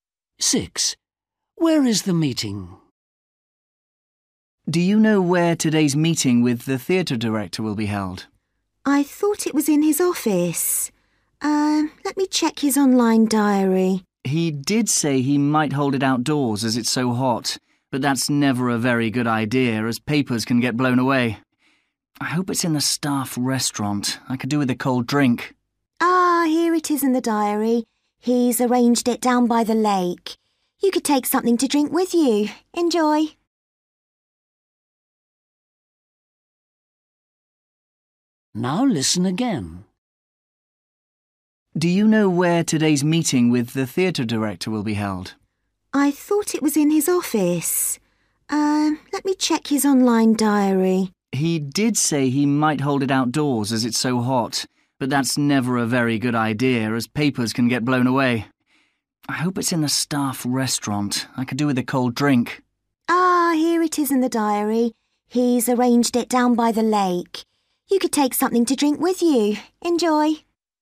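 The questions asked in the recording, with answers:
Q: Where is the meeting?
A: down by the lake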